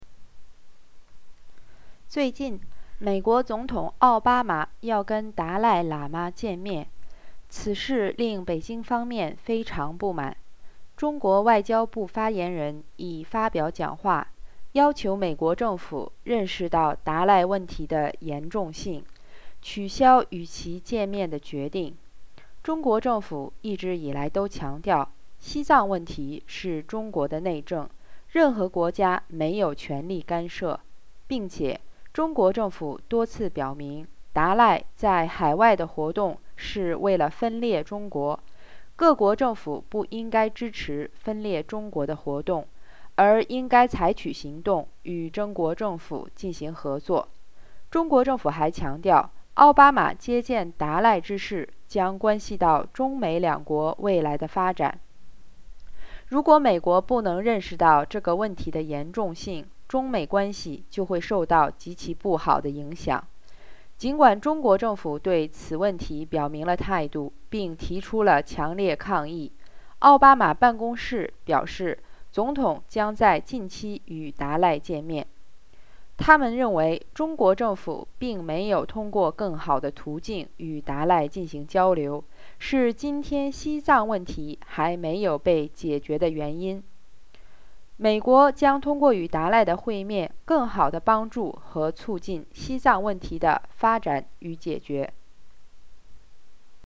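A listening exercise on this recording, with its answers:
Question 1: What did the spokesman from Chinese Foreign Affair ministry say in response to the meeting between Obama and Dalai?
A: He asked the US government to recognize the seriousness of the Dalai issue and cancel the decision to meet him.

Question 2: What do Chinese government appeal other countries to do in terms of Dalai activities abroad?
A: Not to support activities that split China, and to cooperate with the Chinese government.

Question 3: What consequences have the Chinese government warned the US government of?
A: China-US relations would be very badly affected.

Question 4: What is the reaction from Obama's office?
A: The president will still meet the Dalai Lama soon.

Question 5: What is the reason that the US said about meeting Dalai?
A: The Chinese government hasn't communicated with the Dalai in better ways, so the Tibet issue is unresolved; the meeting will help solve it.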